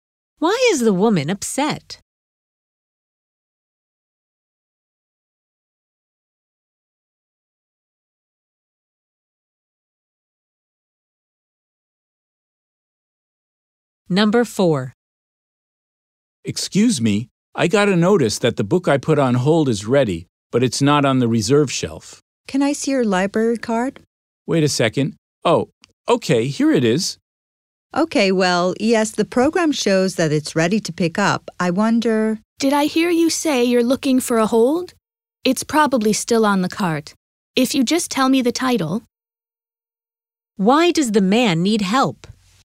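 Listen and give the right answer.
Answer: The book he put on hold isn't on the reserve shelf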